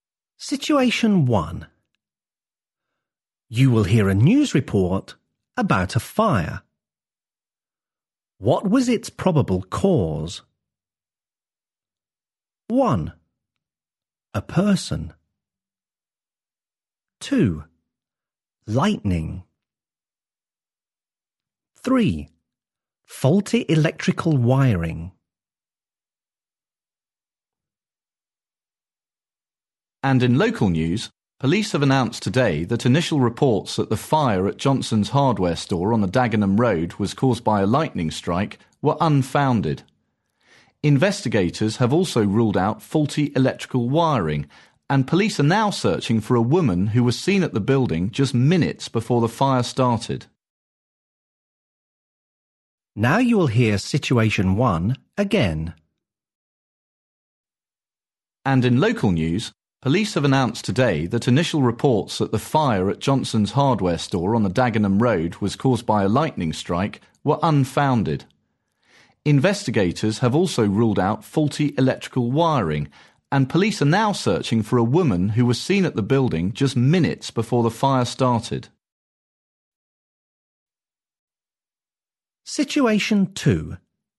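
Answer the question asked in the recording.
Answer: 1: A person.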